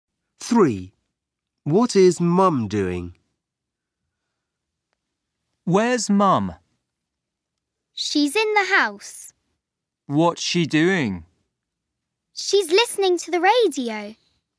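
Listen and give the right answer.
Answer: Listening to the radio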